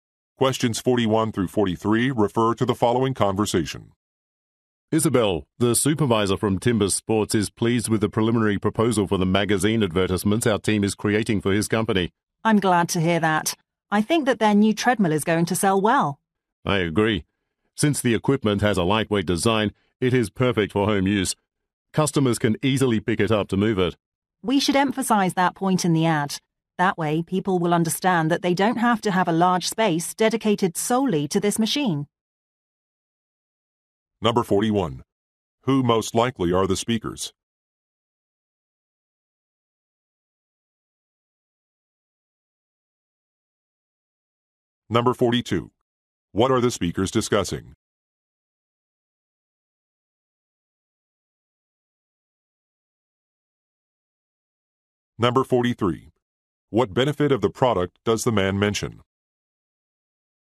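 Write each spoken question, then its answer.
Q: Who most likely are the speakers?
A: Advertising team members

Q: What are the speakers discussing?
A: Magazine ads for a new treadmill

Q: What benefit of the product does the man mention?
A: It is lightweight and easy to move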